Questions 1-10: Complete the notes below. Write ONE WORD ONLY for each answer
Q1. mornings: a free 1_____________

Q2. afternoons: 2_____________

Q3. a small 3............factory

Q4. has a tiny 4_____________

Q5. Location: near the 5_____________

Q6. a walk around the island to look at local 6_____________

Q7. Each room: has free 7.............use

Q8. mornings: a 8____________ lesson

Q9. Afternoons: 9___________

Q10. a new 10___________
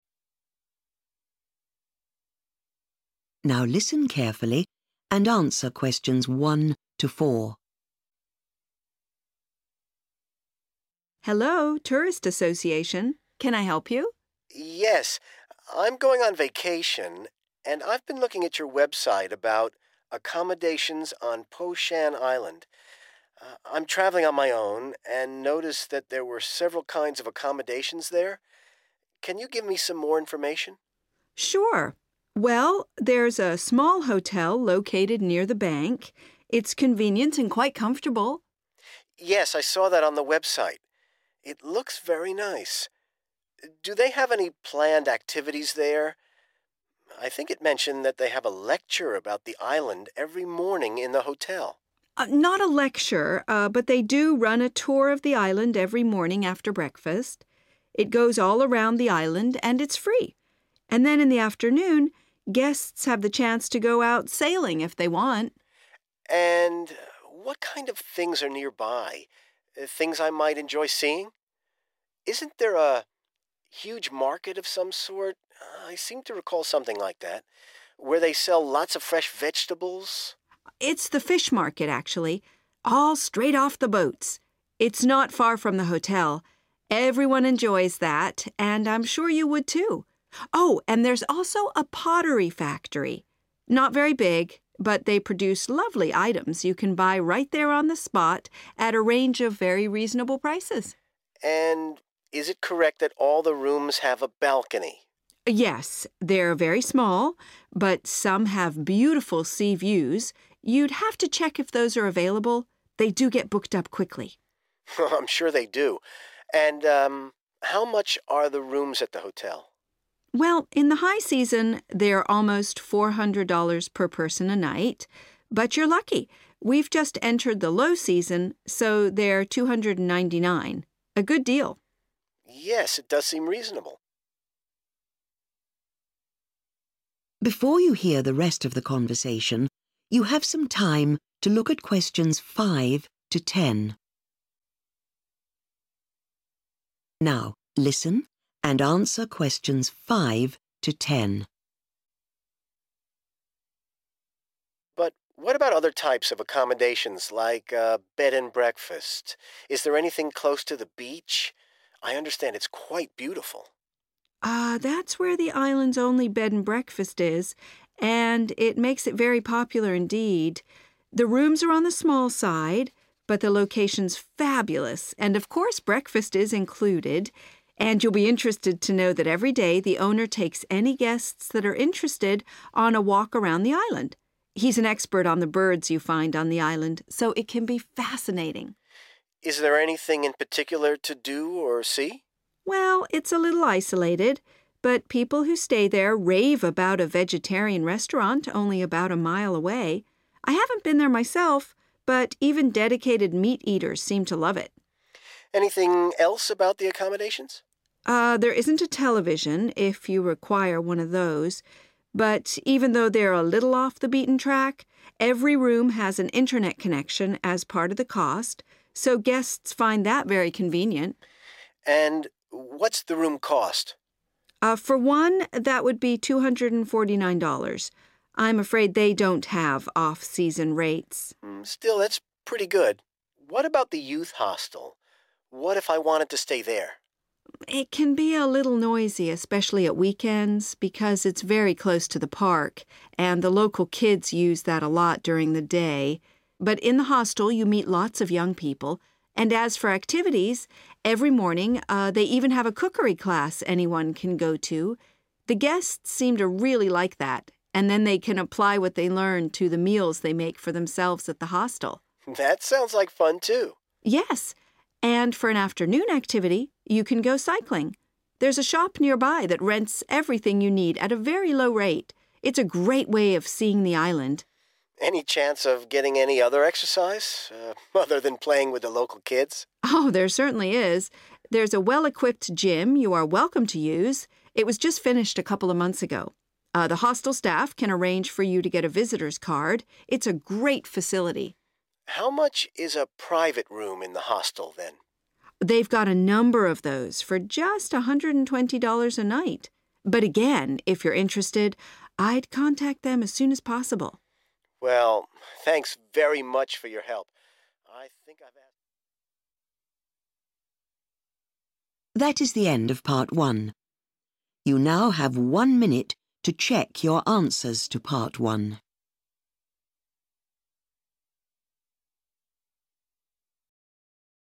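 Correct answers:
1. tour
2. sailing
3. pottery
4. balcony
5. beach
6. birds
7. internet
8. cookery
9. cycling
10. gym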